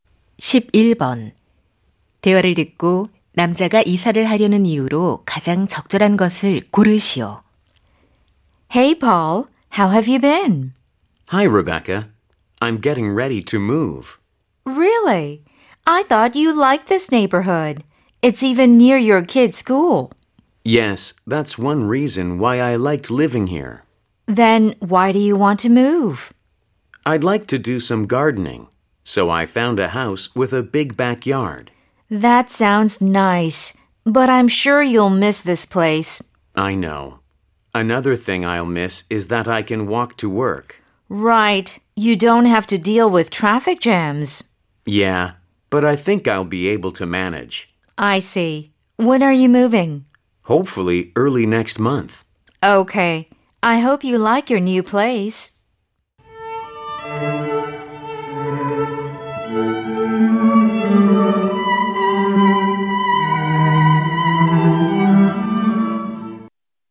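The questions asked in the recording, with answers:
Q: 대화를 듣고 남자가 이사를 하려는 이유로 가장 적절한 것을 고르시오.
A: 넓은 뒷마당에서 정원을 가꾸고 싶어서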